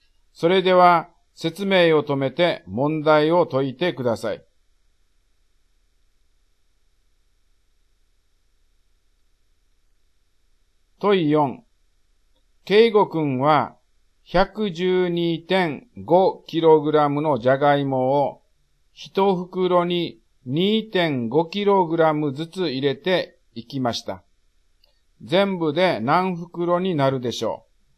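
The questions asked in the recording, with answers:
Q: 全部で何袋になるでしょう?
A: 45袋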